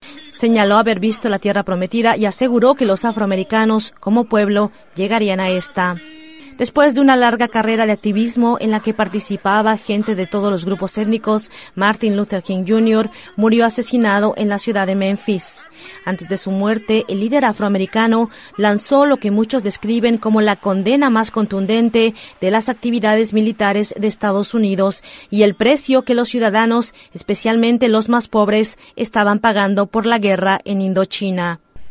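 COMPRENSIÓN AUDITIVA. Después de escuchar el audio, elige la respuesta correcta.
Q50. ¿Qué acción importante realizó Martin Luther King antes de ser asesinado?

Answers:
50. Lanzó una condena muy contundente de las actividades militares de Estados Unidos y del precio que pagaban los ciudadanos por la guerra en Indochina.

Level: Nivel avanzado C1-C2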